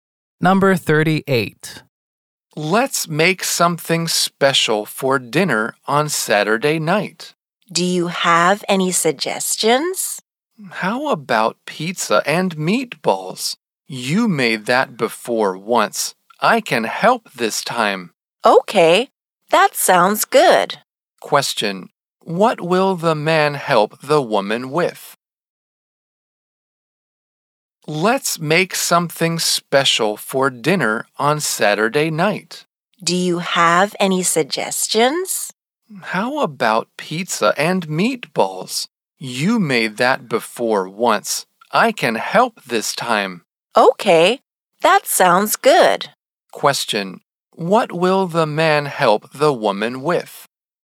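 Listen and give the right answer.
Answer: Making dinner (pizza and meatballs) on Saturday night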